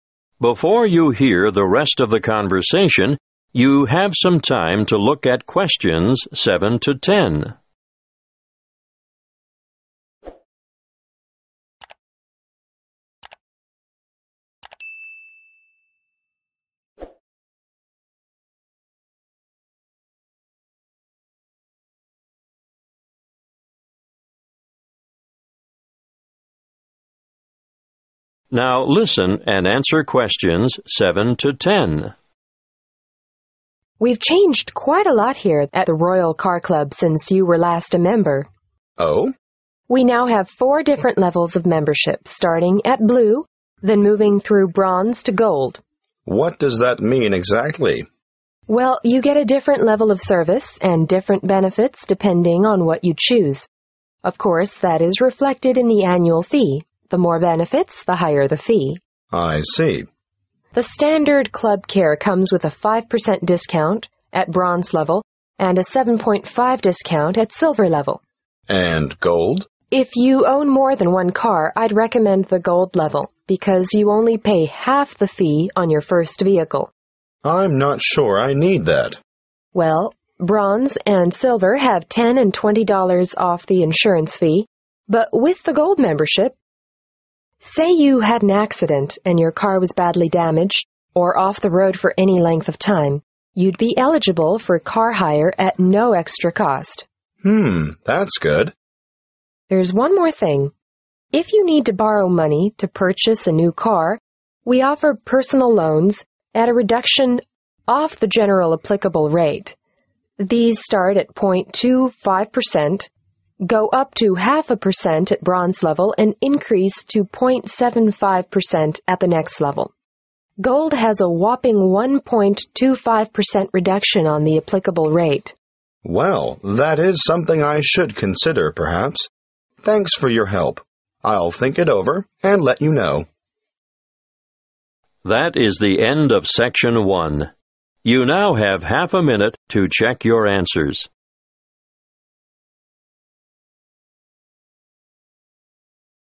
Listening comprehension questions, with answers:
Complete the table below. Write NO MORE THAN TWO WORDS AND/OR A NUMBER in each gap.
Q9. Free 9 ...................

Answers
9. car hire